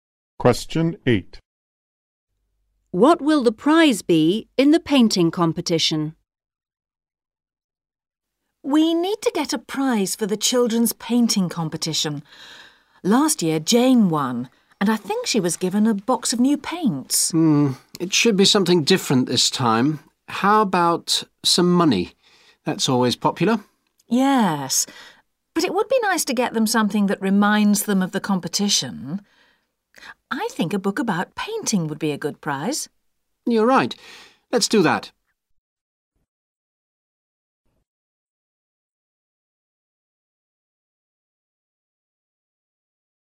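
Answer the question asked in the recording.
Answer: A book about painting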